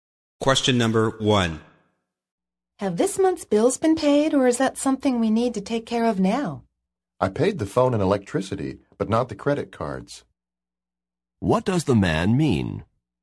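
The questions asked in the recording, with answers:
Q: What does the man mean?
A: Some bills are paid, but the credit cards still need paying.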